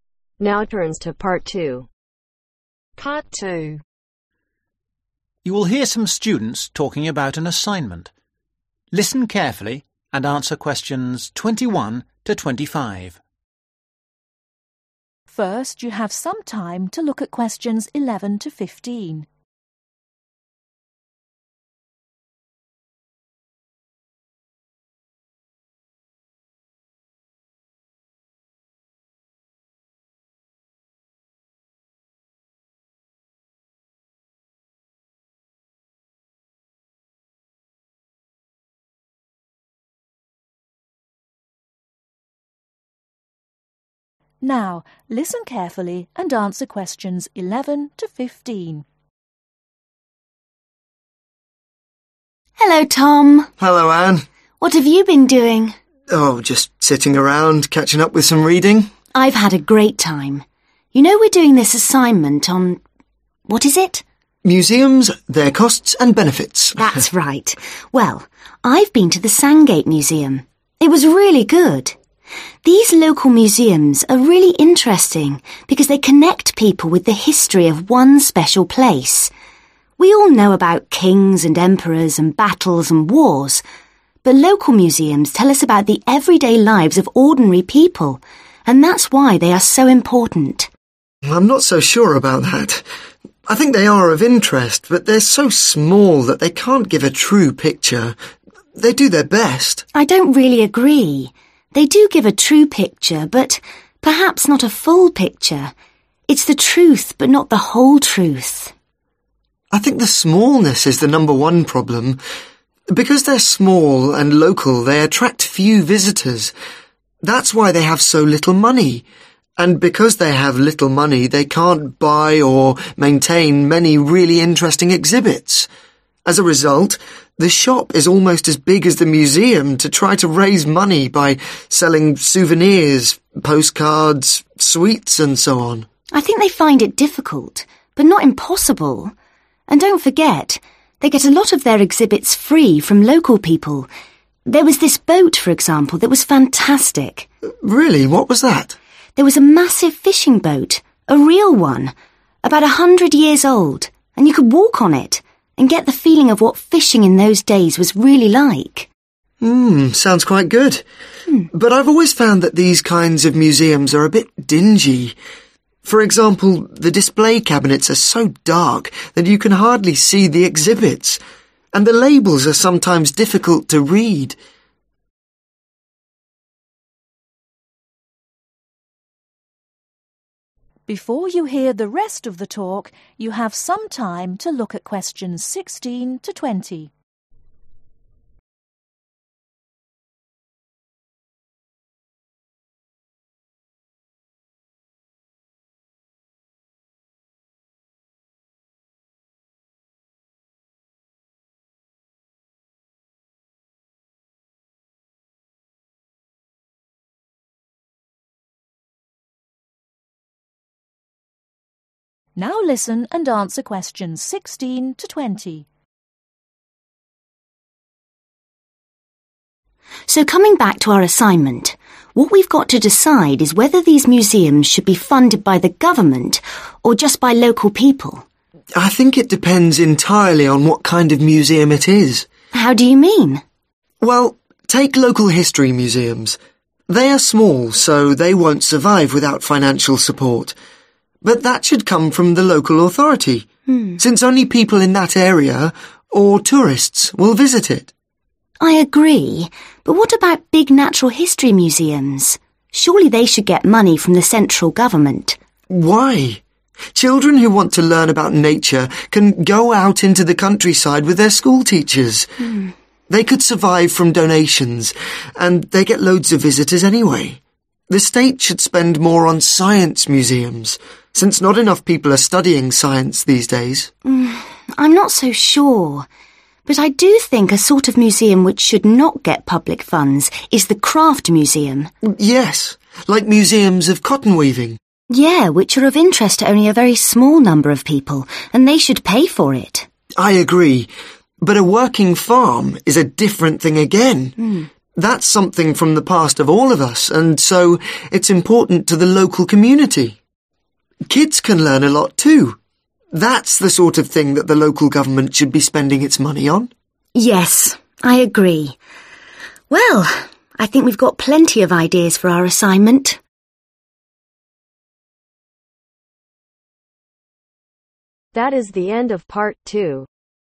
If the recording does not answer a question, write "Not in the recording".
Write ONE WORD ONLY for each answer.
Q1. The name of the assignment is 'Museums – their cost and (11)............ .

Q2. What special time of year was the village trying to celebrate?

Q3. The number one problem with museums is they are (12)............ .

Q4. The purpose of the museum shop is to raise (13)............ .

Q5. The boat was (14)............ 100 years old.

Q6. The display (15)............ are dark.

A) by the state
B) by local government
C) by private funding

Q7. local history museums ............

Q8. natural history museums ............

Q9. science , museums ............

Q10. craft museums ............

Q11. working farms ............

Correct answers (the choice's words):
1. Benefits
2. Not in the recording
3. Small
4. Money
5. About
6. Cabinets
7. by local government
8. by private funding
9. by the state
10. by private funding
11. by local government